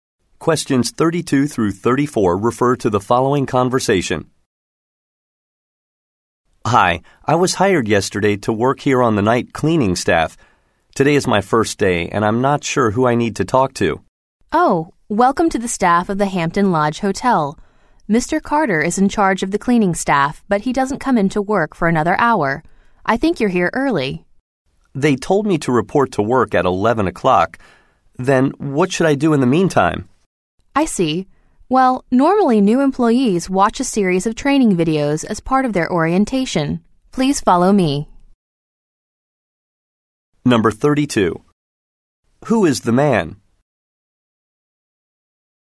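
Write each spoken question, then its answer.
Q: Who is the man?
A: A new night cleaning staff member at the hotel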